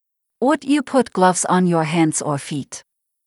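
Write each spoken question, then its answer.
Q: Would you put gloves on your hands or feet?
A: Hands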